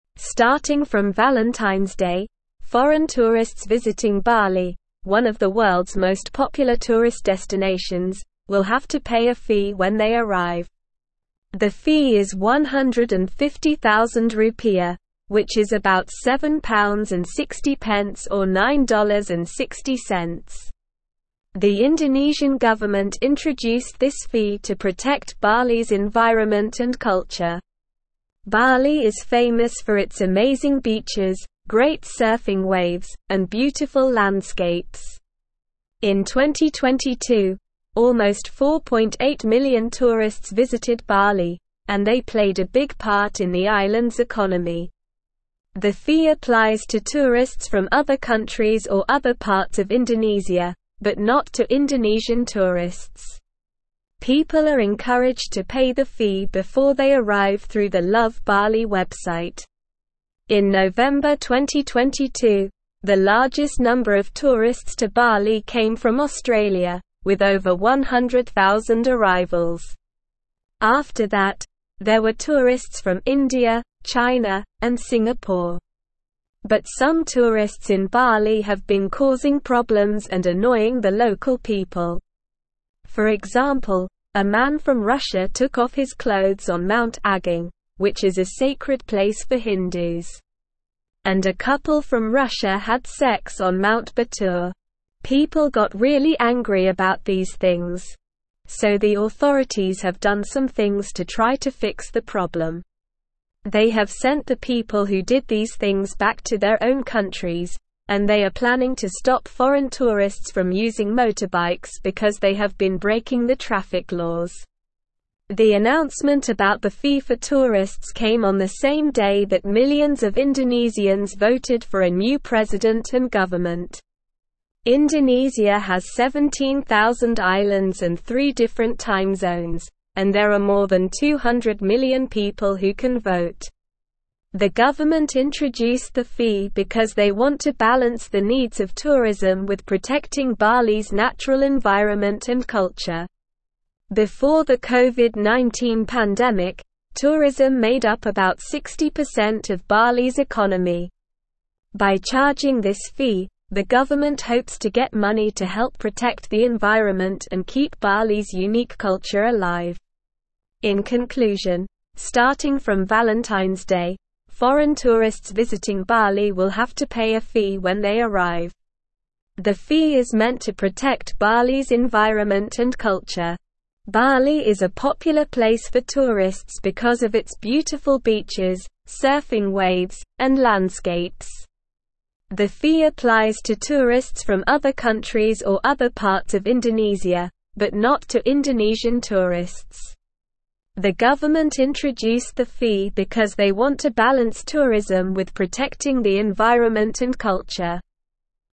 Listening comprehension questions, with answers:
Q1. Starting from Valentine's Day, (1)______ tourists visiting Bali, one of the world's most popular tourist destinations, will have to pay a fee when they arrive.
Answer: foreign

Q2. The (2)______n government introduced this fee to protect Bali's (3)______ and culture.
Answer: Indonesia

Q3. The (2)______n government introduced this fee to protect Bali's (3)______ and culture.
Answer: environment

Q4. The fee (4)______ to tourists from other countries or other parts of Indonesia, but not to Indonesian tourists.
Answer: applies

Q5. In November 2022, the largest (5)______ of (6)______ to Bali came from Australia, with over 100,000 arrivals.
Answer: number

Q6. In November 2022, the largest (5)______ of (6)______ to Bali came from Australia, with over 100,000 arrivals.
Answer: tourists

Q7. But some tourists in Bali have been causing (7)______ and annoying the local people.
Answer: problems

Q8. For example, a man from Russia took off his clothes on Mount (8)______, which is a sacred place for Hindus.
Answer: Agung

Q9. They have sent the people who did these things back to their own countries, and they are planning to stop foreign tourists from using motorbikes because they have been (9)______ the traffic laws.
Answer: breaking

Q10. The announcement about the fee for tourists came on the same day that millions of Indonesians (10)______ for a new president and government.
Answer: voted

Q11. The government introduced the fee because they want to balance the needs of (11)______ with protecting Bali's (12)______ environment and culture.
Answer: tourism

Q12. The government introduced the fee because they want to balance the needs of (11)______ with protecting Bali's (12)______ environment and culture.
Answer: natural

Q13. By charging this fee, the government hopes to get money to help protect the environment and keep Bali's (13)______ (14)______ alive.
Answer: unique

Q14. By charging this fee, the government hopes to get money to help protect the environment and keep Bali's (13)______ (14)______ alive.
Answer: culture

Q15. Bali is a popular place for tourists because of its beautiful beaches, surfing (15)______, and landscapes.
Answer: waves

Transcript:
Starting from Valentine's Day, foreign tourists visiting Bali, one of the world's most popular tourist destinations, will have to pay a fee when they arrive. The fee is 150,000 rupiah, which is about £7.60 or $9.60. The Indonesian government introduced this fee to protect Bali's environment and culture. Bali is famous for its amazing beaches, great surfing waves, and beautiful landscapes. In 2022, almost 4.8 million tourists visited Bali, and they played a big part in the island's economy. The fee applies to tourists from other countries or other parts of Indonesia, but not to Indonesian tourists. People are encouraged to pay the fee before they arrive through the Love Bali website.
In November 2022, the largest number of tourists to Bali came from Australia, with over 100,000 arrivals. After that, there were tourists from India, China, and Singapore. But some tourists in Bali have been causing problems and annoying the local people. For example, a man from Russia took off his clothes on Mount Agung, which is a sacred place for Hindus. And a couple from Russia had sex on Mount Batur. People got really angry about these things. So the authorities have done some things to try to fix the problem. They have sent the people who did these things back to their own countries, and they are planning to stop foreign tourists from using motorbikes because they have been breaking the traffic laws.
The announcement about the fee for tourists came on the same day that millions of Indonesians voted for a new president and government. Indonesia has 17,000 islands and three different time zones, and there are more than 200 million people who can vote. The government introduced the fee because they want to balance the needs of tourism with protecting Bali's natural environment and culture. Before the COVID-19 pandemic, tourism made up about 60% of Bali's economy. By charging this fee, the government hopes to get money to help protect the environment and keep Bali's unique culture alive.
Bali is a popular place for tourists because of its beautiful beaches, surfing waves, and landscapes.

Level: Level 3